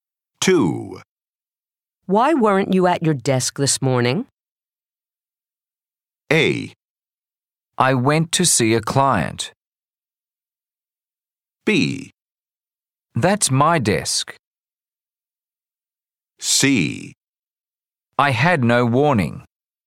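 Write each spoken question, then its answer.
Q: Why weren't you at your desk this morning?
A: A: I went to see a client.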